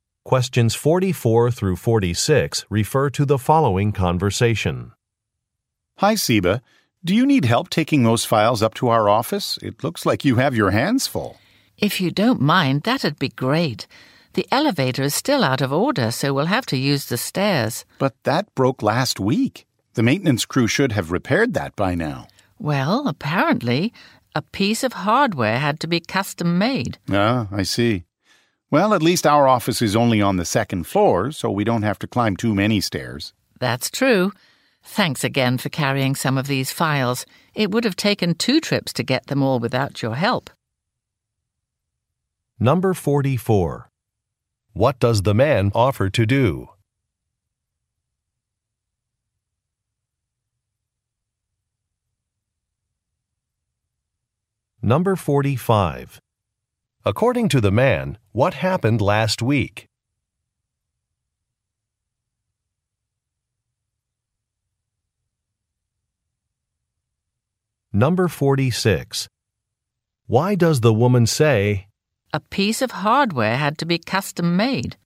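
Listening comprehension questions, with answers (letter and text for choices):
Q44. What does the man offer to do?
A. Meet in the lobby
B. Contact a receptionist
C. Carry some files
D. Delay a meeting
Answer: C. Carry some files

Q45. According to the man, what happened last week?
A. An office door would not lock.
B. A sink was installed incorrectly.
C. An elevator stopped working.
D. A document was lost.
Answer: C. An elevator stopped working.

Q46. Why does the woman say, "a piece of hardware had to be custom made"?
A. To justify a price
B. To explain a delay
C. To illustrate a product's age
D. To express regret for a purchase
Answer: B. To explain a delay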